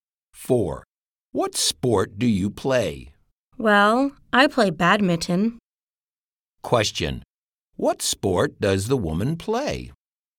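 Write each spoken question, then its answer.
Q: Question. What sport does the woman play?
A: Badminton.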